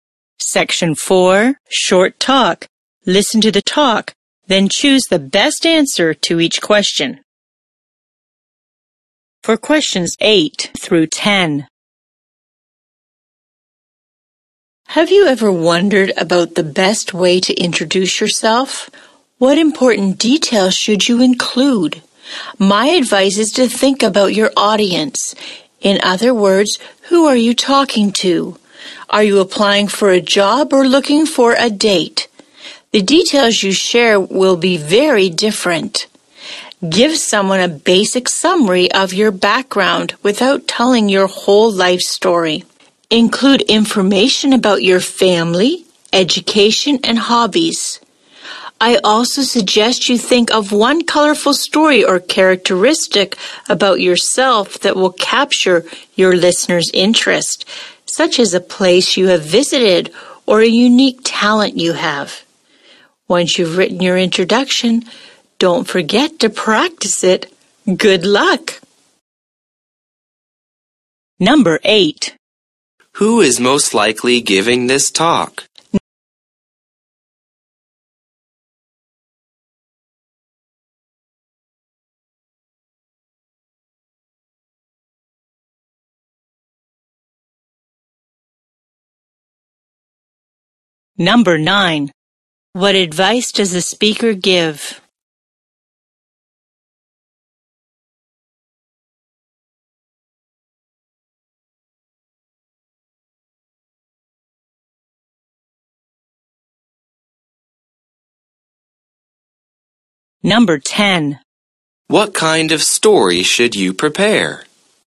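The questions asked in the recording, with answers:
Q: What kind of story should you prepare?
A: One colorful story about yourself that will catch your listener's interest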